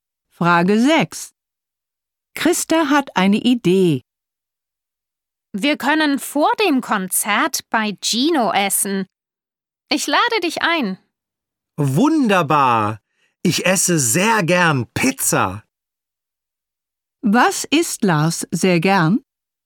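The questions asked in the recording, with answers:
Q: Was isst Lars sehr gern?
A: Pizza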